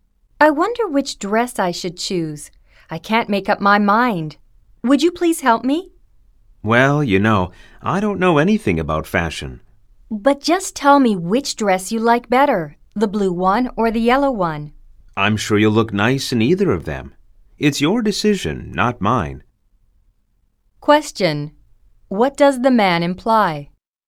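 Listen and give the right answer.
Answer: The woman should choose the dress herself; she would look nice in either one.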